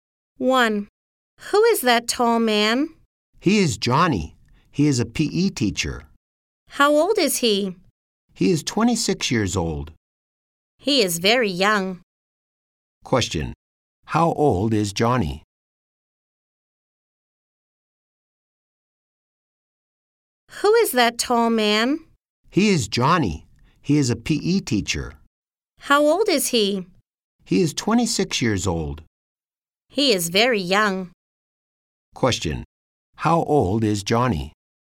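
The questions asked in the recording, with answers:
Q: How old is Johnny?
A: He is 26 years old.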